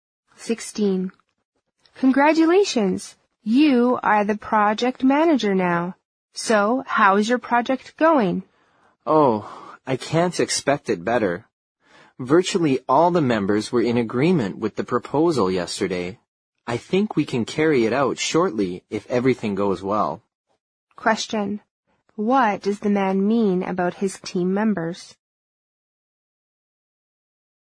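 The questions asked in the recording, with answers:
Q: What does the man mean about his team members?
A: Almost all of them agreed with the proposal.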